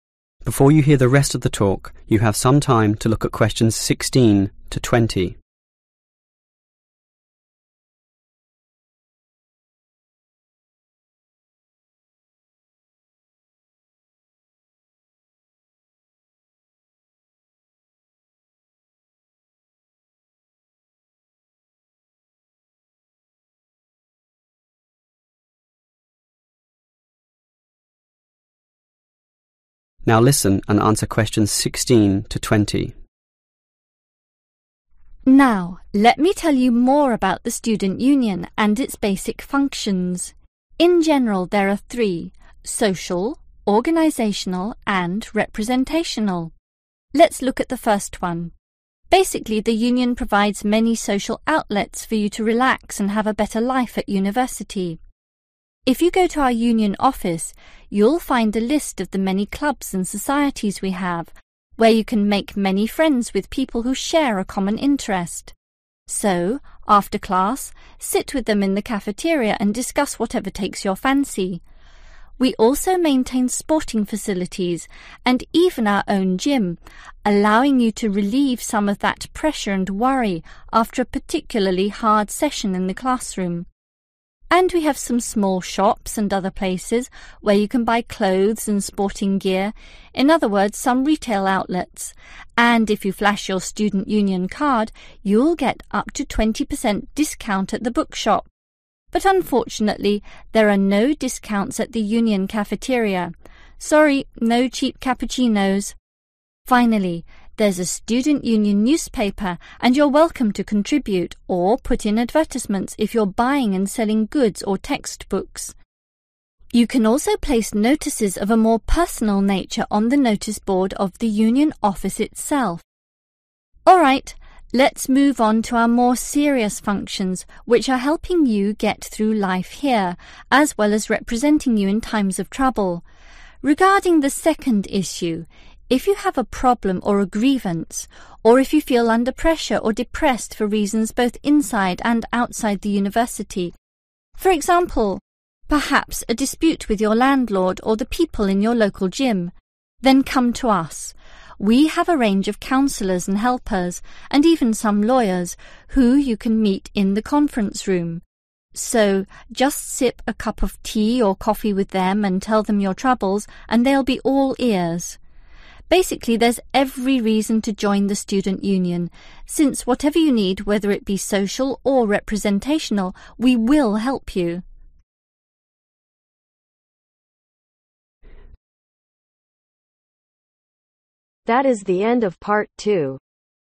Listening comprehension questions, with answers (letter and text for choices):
Choose FIVE answers from the list. Write the correct letter , A-G , next to questions.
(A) The bookshop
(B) Club & societies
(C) The gym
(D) The conference room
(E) Student Union newspaper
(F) The Union cafeteria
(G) The Union office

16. Make friends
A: (B) Club & societies

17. Reduce your stress after class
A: (C) The gym

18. Pay reduced prices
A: (A) The bookshop

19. Place personal notices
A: (G) The Union office

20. Obtain legal advice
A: (D) The conference room